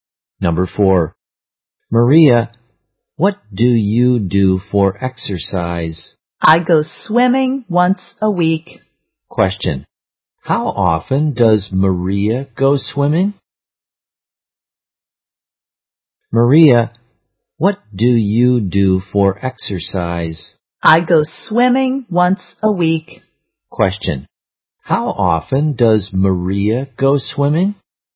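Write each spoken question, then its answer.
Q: Question. How often does Maria go swimming?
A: Once a week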